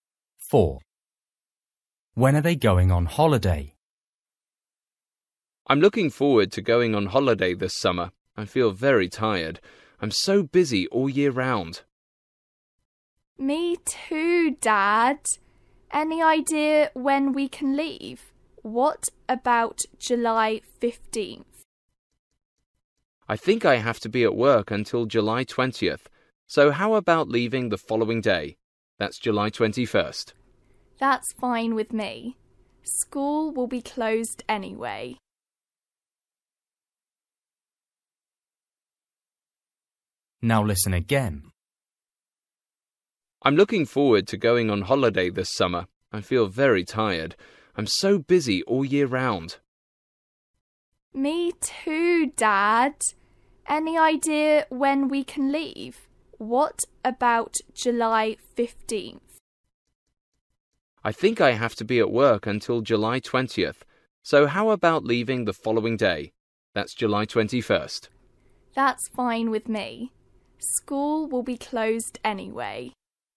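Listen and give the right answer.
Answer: July 21st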